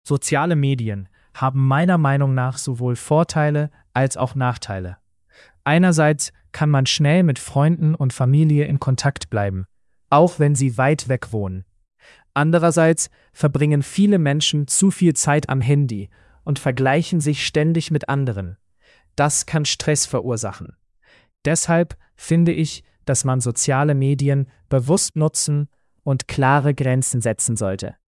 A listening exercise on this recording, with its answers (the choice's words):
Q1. Welche Struktur benutzt die Person?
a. nur Vorteile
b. nur Nachteile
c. Vorteile und Nachteile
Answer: Vorteile und Nachteile

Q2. Welcher Vorteil wird genannt?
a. Man kann schnell Kontakt halten.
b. Man schläft besser.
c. Man spart Geld.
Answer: Man kann schnell Kontakt halten.

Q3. Was empfiehlt die Person?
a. Soziale Medien komplett verbieten.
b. Soziale Medien bewusst nutzen und Grenzen setzen.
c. Mehr Zeit am Handy verbringen.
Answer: Soziale Medien bewusst nutzen und Grenzen setzen.

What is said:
Soziale Medien haben meiner Meinung nach sowohl Vorteile als auch Nachteile. Einerseits kann man schnell mit Freunden und Familie in Kontakt bleiben, auch wenn sie weit weg wohnen. Andererseits verbringen viele Menschen zu viel Zeit am Handy und vergleichen sich ständig mit anderen. Das kann Stress verursachen. Deshalb finde ich, dass man soziale Medien bewusst nutzen und klare Grenzen setzen sollte.

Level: B2-Niveau